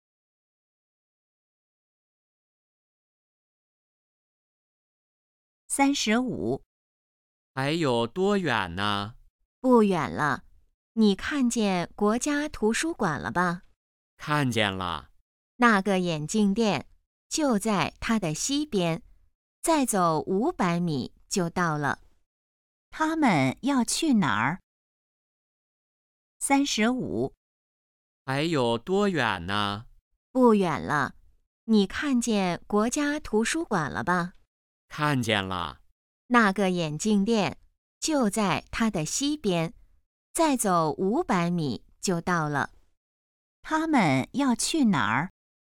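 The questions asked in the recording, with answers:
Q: 他们要去哪儿?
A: 眼镜店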